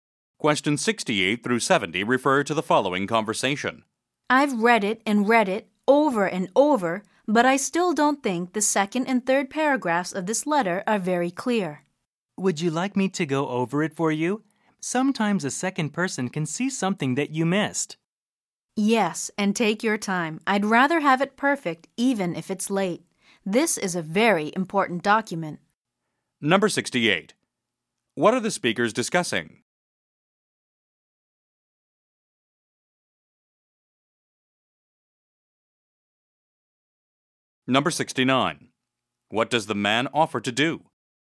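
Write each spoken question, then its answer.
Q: What are the speakers discussing?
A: A letter

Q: What does the man offer to do?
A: Go over the letter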